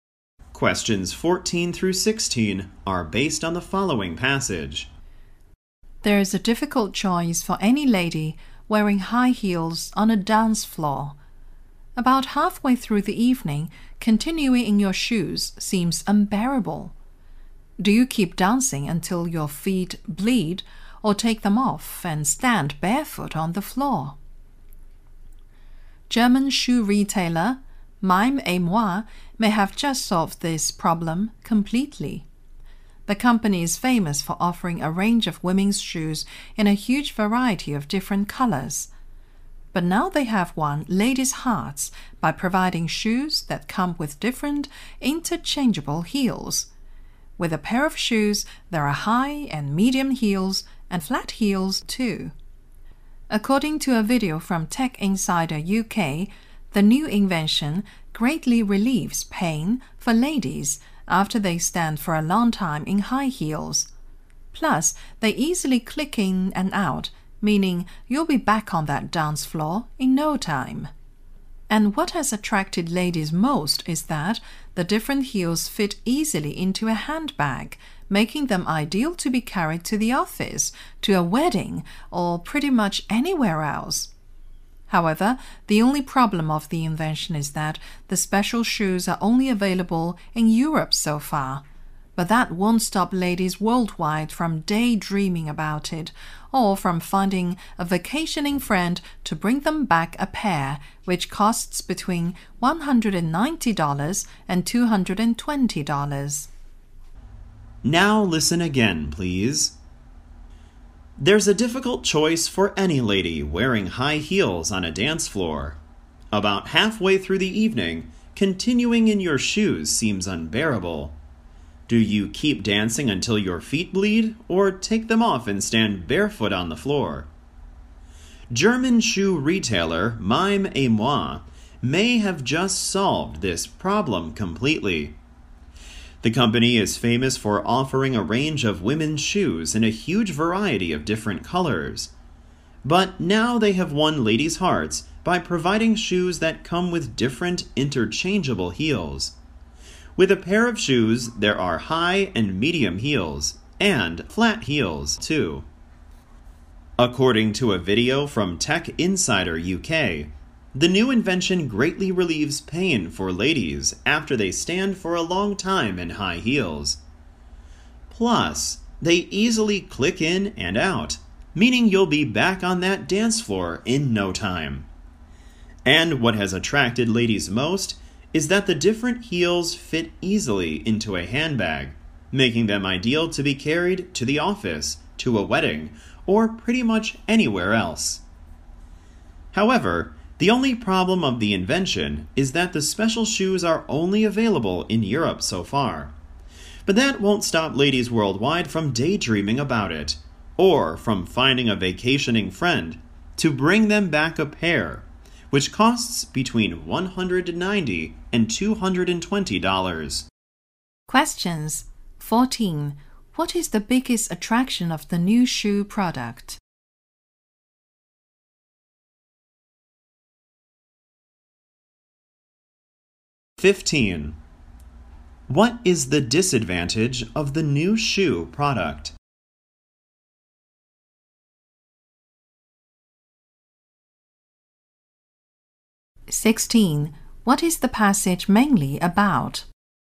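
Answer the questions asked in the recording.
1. The different heels fit easily into a handbag, so they're easy to carry.
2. So far they're only available in Europe.
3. Women's shoes with interchangeable heels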